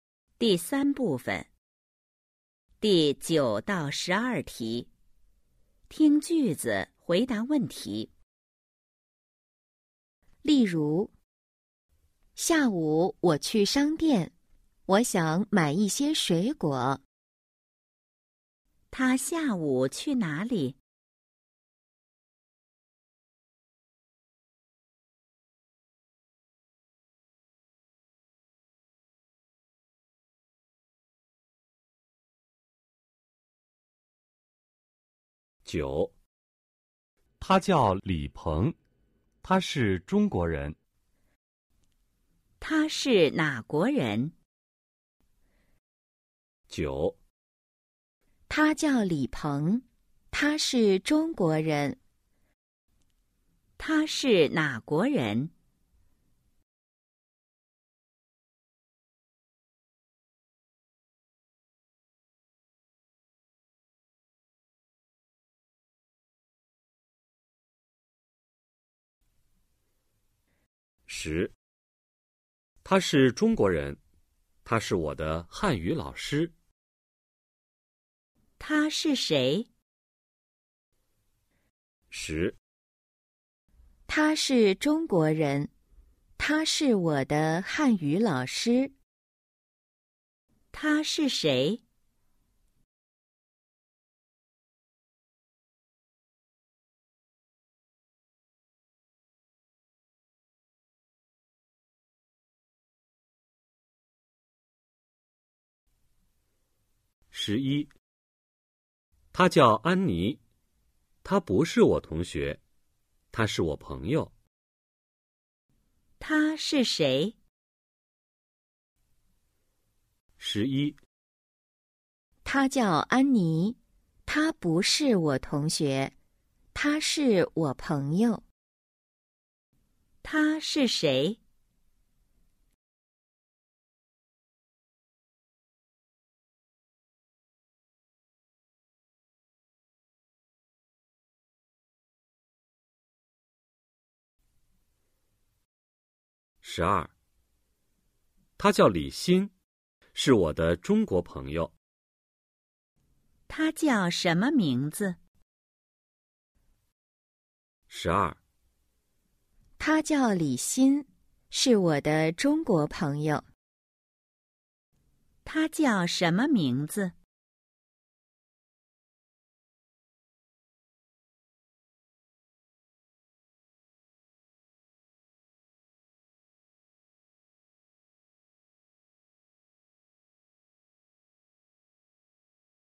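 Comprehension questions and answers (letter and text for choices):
第 9–12 题:听句子,回答问题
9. 他是哪国人?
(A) 美国人 – Měiguó rén – Người Mỹ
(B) 法国人 – Fǎguó rén – Người Pháp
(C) 中国人 – Zhōngguó rén – Người Trung Quốc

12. 她叫什么名字?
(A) 王方 – Wáng Fāng – Vương Phương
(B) 李心 – Lǐ Xīn – Lý Tâm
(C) 安妮 – Ānnī – Annie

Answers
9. (C) 中国人 – Zhōngguó rén – Người Trung Quốc
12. (B) 李心 – Lǐ Xīn – Lý Tâm

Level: HSK 1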